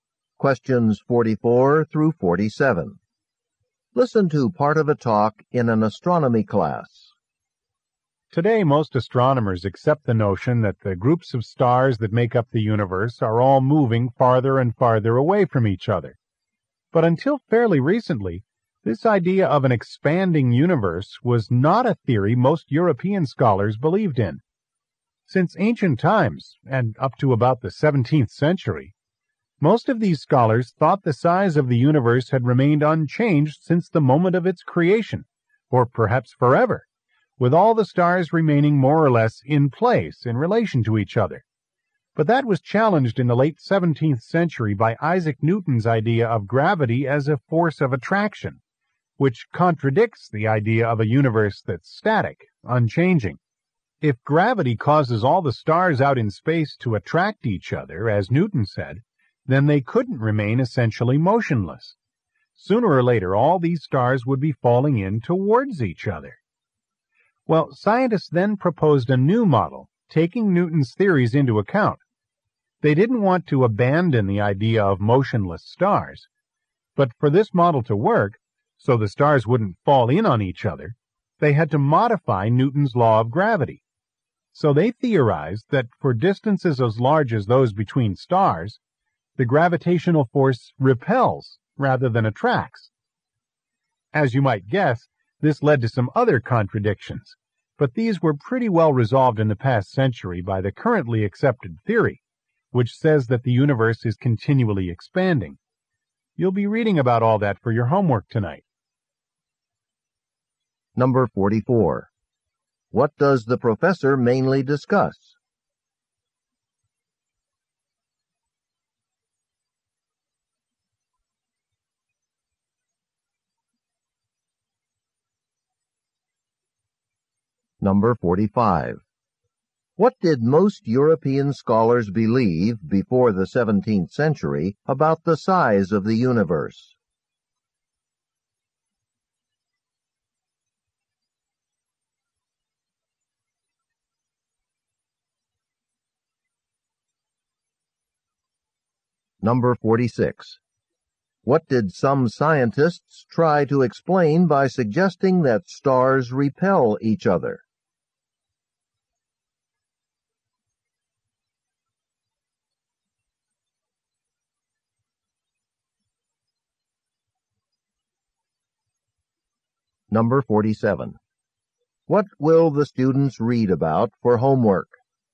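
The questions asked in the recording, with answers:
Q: What does the professor mainly discuss?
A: How theories about the universe's expansion developed

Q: What did most European scholars believe before the 17th century about the size of the universe?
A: It remained unchanged

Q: What did some scientists try to explain by suggesting that stars repel each other?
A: Why stars don't fall in on each other

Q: What will the students read about for homework?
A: The theory of the expanding universe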